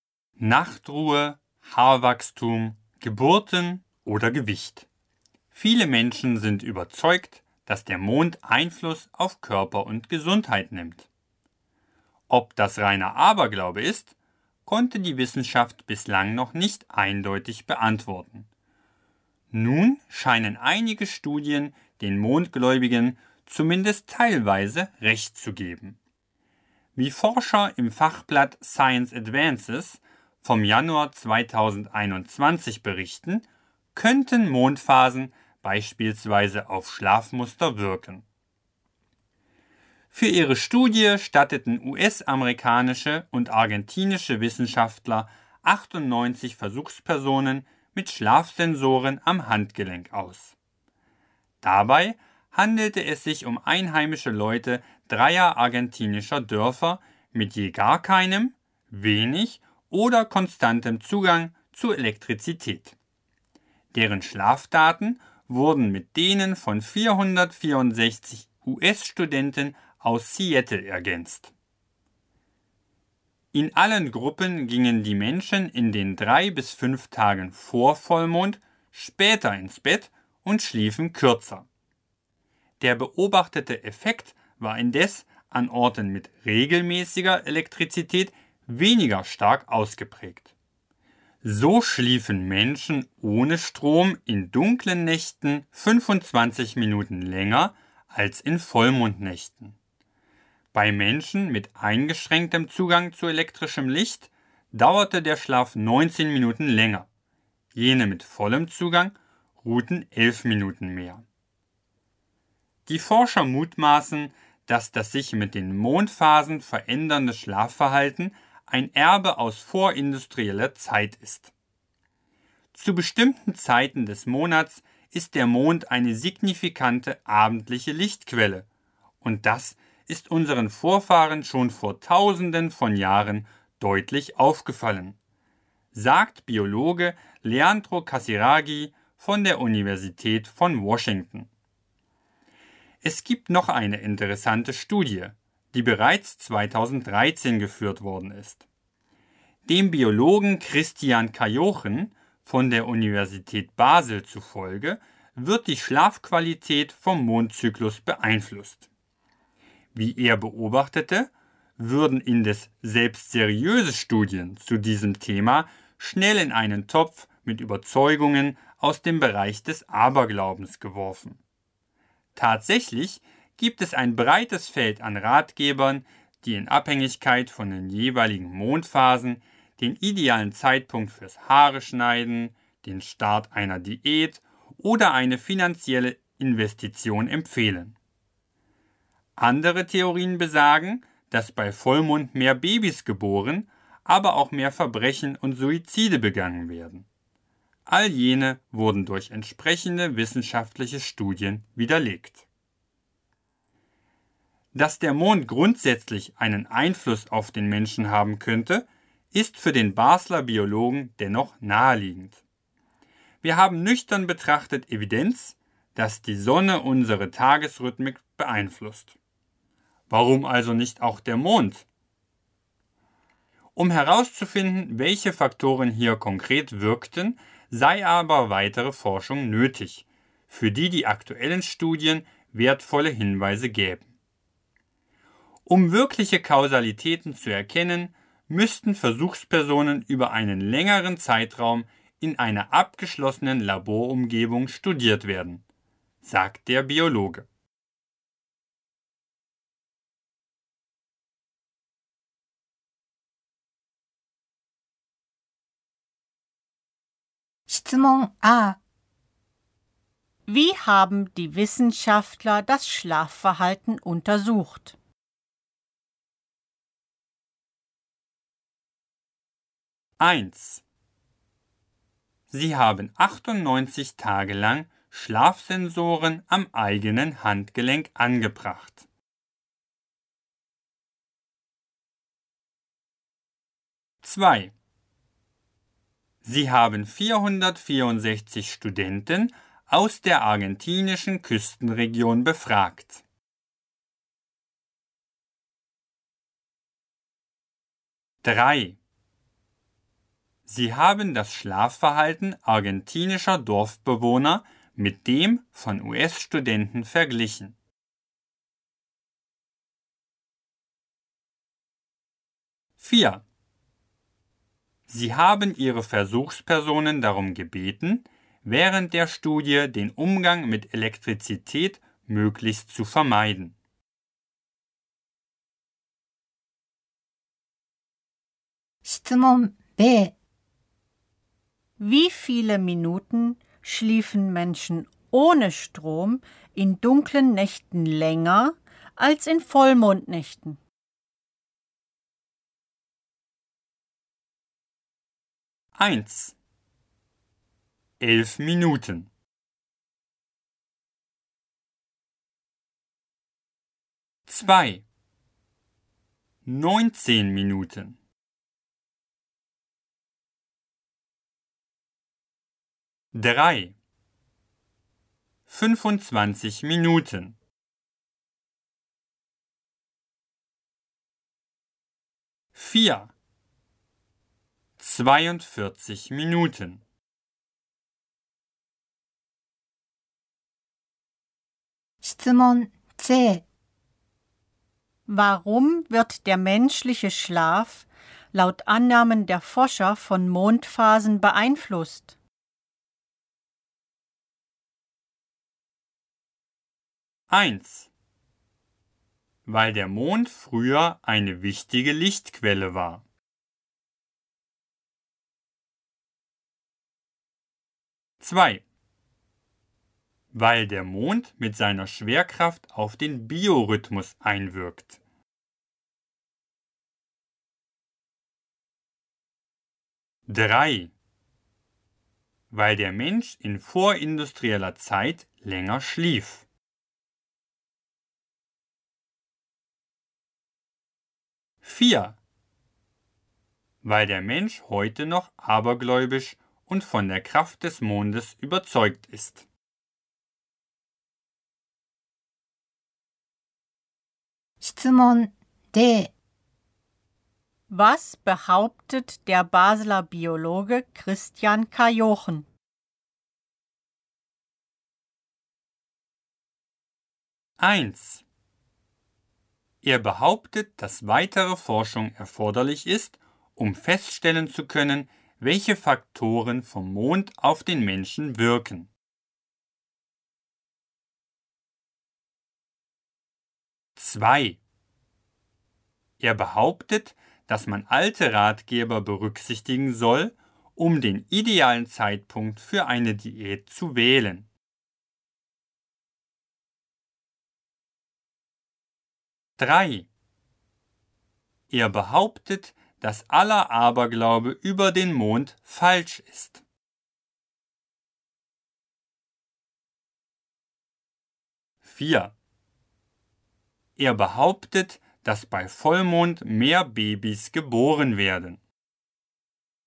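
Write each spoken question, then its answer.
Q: Wie haben die Wissenschaftler das Schlafverhalten untersucht?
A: 3: Sie haben das Schlafverhalten argentinischer Dorfbewohner mit dem von US-Studenten verglichen.

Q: Wie viele Minuten schliefen Menschen ohne Strom in dunklen Nächten länger als in Vollmondnächten?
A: 3: 25 Minuten.

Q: Warum wird der menschliche Schlaf laut Annahmen der Forscher von Mondphasen beeinflusst?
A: 1: Weil der Mond früher eine wichtige Lichtquelle war.

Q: Was behauptet der Basler Biologe Christian Kajochen?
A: 1: Er behauptet, dass weitere Forschung erforderlich ist, um feststellen zu können, welche Faktoren vom Mond auf den Menschen wirken.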